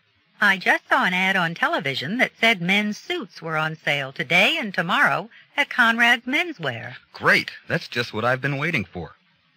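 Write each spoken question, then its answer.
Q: What will the man probably do?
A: Go to Conrad Menswear to buy a suit on sale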